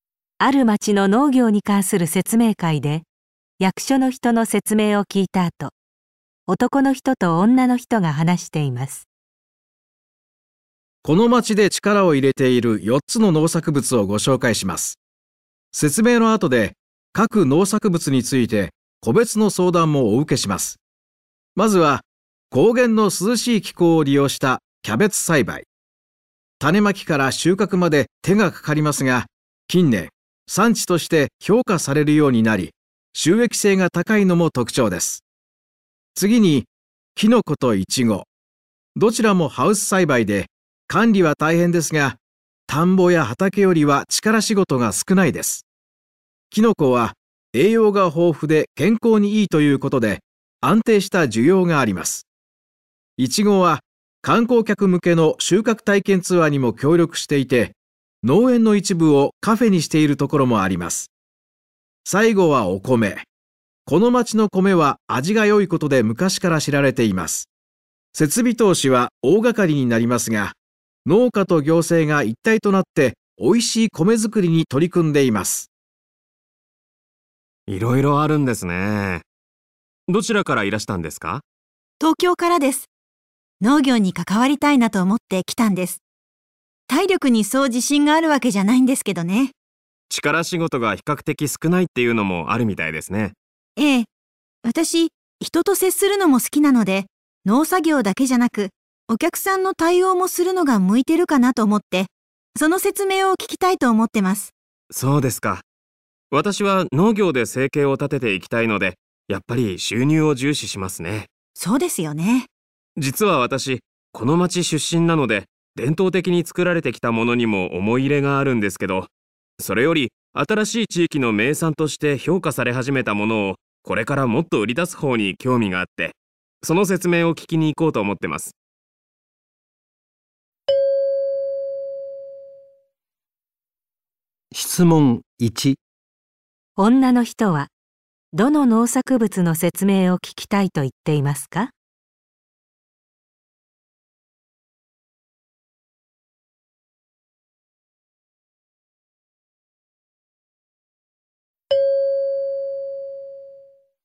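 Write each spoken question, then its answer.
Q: 女の人はどの農作物の説明を聞きたいと言っていますか?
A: イチゴ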